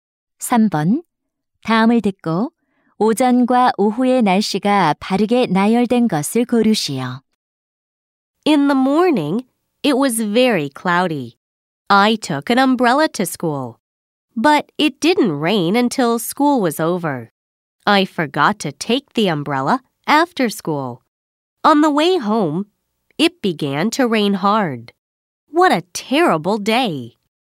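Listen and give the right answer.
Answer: 오전: 흐림, 오후: 비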